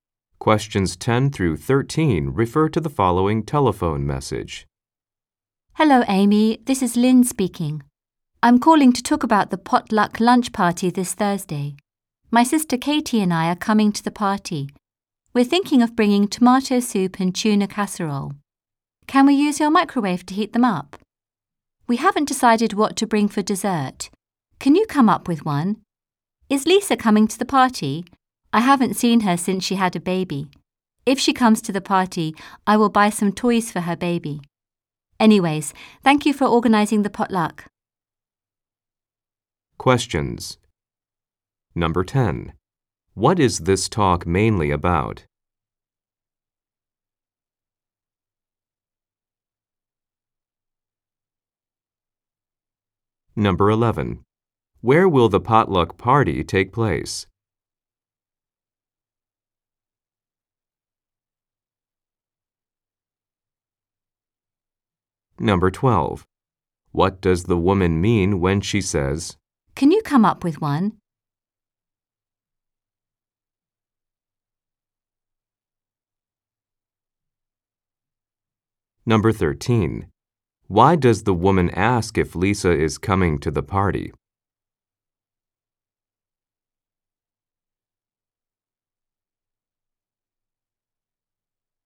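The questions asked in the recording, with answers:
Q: What is this talk mainly about?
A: A potluck lunch party this Thursday

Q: What does the woman mean when she says,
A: She wants Amy to suggest a dessert to bring

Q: Why does the woman ask if Lisa is coming to the party?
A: To know whether to buy toys for Lisa's baby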